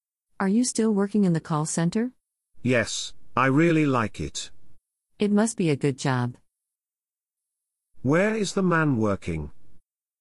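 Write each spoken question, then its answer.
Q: Where is the man working?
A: In a call center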